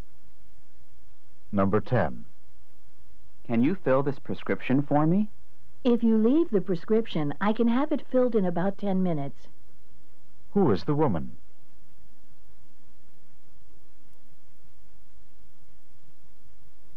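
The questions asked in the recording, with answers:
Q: Who is the woman?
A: A pharmacist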